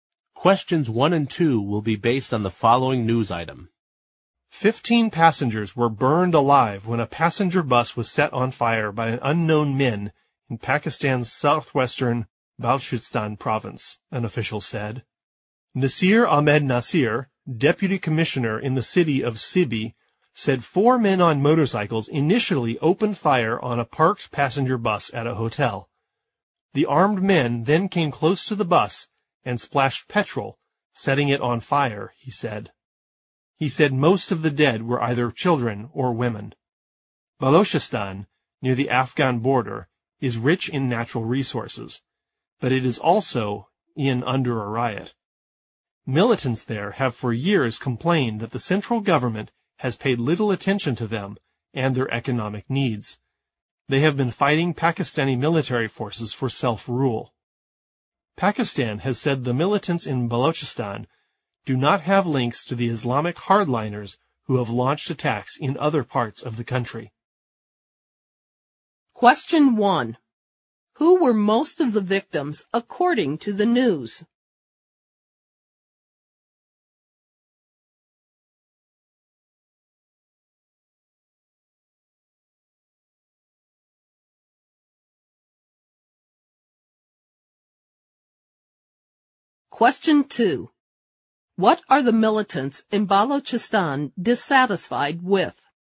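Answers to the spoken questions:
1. Children or women
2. The central government has paid little attention to them and their economic needs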